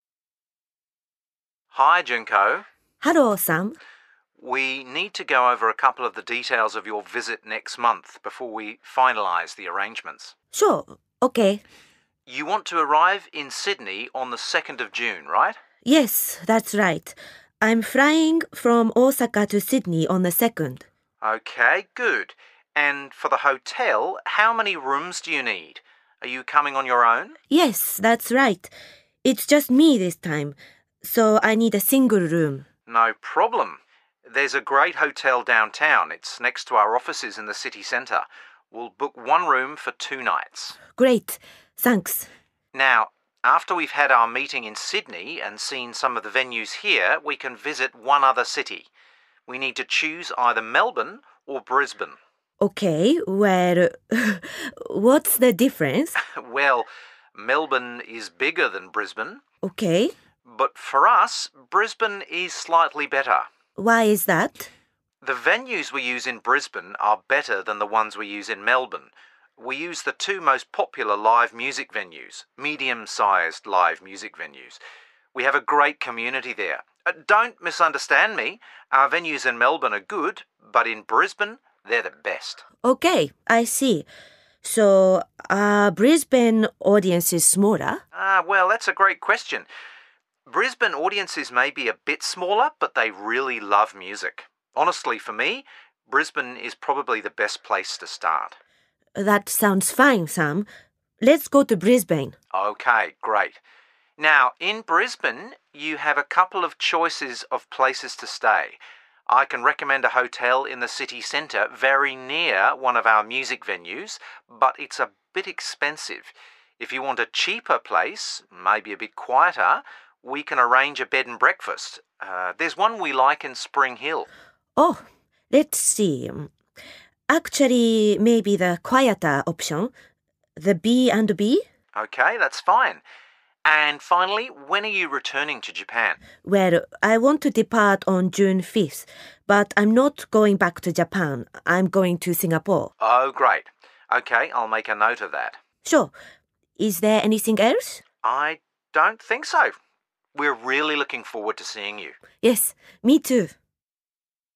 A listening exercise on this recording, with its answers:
A. Junko is now planning a visit to Australia. Listen to her phone call with Sam from OzMusicNow. Complete Sam's notes for the phone call.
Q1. Arrival date? .............................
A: 2 June

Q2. How many hotel rooms? .............................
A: one

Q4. Hotel choice in second city? .............................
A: bed and breakfast / B&B (in Spring Hill)

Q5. Departure date? .............................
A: 5 June

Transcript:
A: Hi, Junko.
B: Hello, Sam.
A: We need to go over a couple of the details of your visit next month before we finalise the arrangements.
B: Sure, OK.
A: You want to arrive in Sydney on the second of June, right?
B: Yes, that's right. I'm ying from Osaka to Sydney on the second.
A: OK, good. And for the hotel, how many rooms do you need? Are you coming on your own?
B: Yes, that's right – it's just me this time. So I need a single room.
A: No problem. There's a great hotel downtown – it's next to our offices in the city centre. We'll book one room for two nights.
B: Great. Thanks.
A: Now, after we've had our meeting in Sydney and seen some of the venues here, we can visit one other city. We need to choose either Melbourne or Brisbane.
B: OK, well ... what's the difference?
A: Well, Melbourne is bigger than Brisbane ...
B: OK ...
A: But for us, Brisbane is slightly better.
B: Why is that?
A: The venues we use in Brisbane are better than the ones we use in Melbourne. We use the two most popular live music venues – medium-sized live music venues. We have a great community there. Don't misunderstand me – our venues in Melbourne are good, but in Brisbane, they're the best.
B: OK, I see. So ... are Brisbane audiences smaller?
A: Ah, well, that's a great question. Brisbane audiences may be a bit smaller, but they really love music. Honestly, for me, Brisbane is probably the best place to start.
B: That sounds ne, Sam. Let's go to Brisbane.
A: OK, great. Now, in Brisbane, you have a couple of choices of places to stay. I can recommend a hotel in the city centre very near one of our music venues, but it's a bit expensive. If you want a cheaper place – maybe a bit quieter – we can arrange a bed and breakfast. There's one we like in Spring Hill.
B: Oh, let's see – actually, maybe the quieter option? The B&B?
A: OK, that's ne. And finally, when are you returning to Japan?
B: Well, I want to depart on June fifth, but I'm not going back to Japan. I'm going to Singapore.
A: Oh, great. OK. I'll make a note of that.
B: Sure. Is there anything else?
A: I don't think so. We're really looking forward to seeing you!
B: Yes, me too.